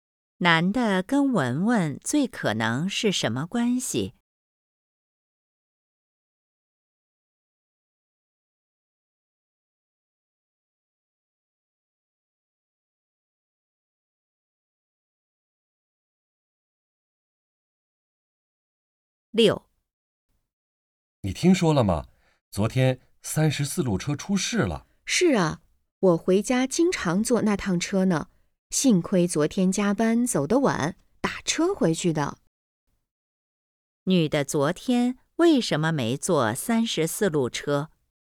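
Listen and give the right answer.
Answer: 因为加班走得晚,打车回去的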